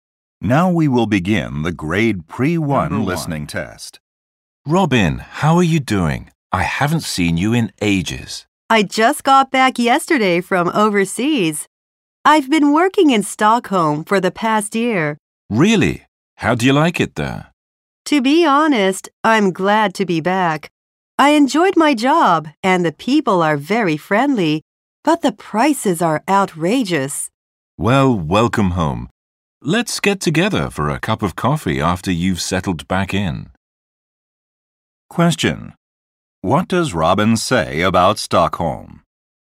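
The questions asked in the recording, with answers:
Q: What does Robin say about Stockholm?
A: Things there are very expensive.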